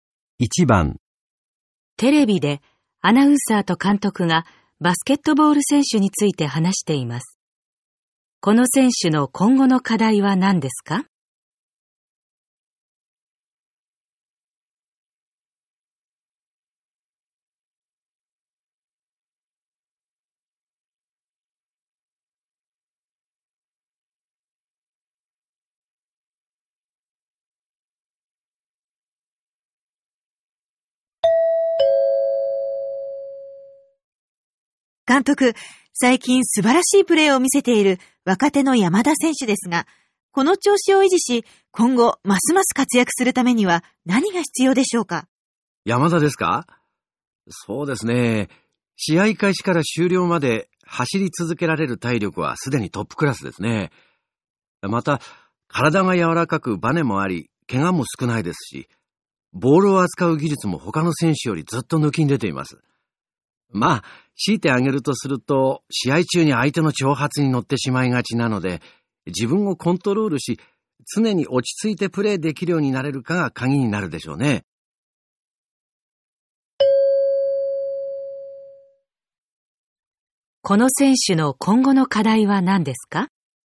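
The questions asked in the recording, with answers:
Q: この選手の今後の課題は何ですか?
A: 相手の挑発に乗らず、常に落ち着いてプレーすること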